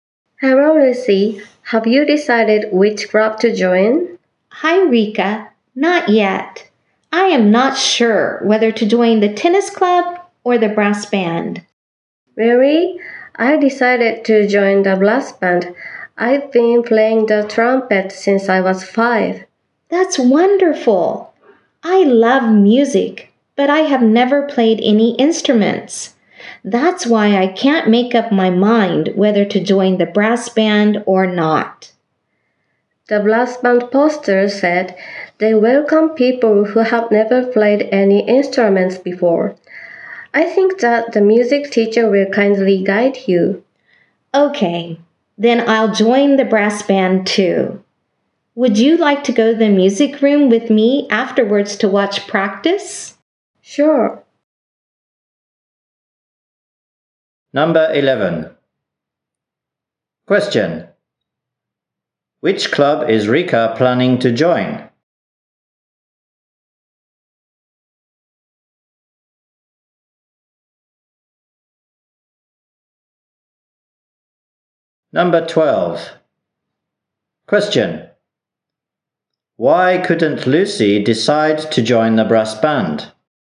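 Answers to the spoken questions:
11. The brass band
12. Because she has never played any instruments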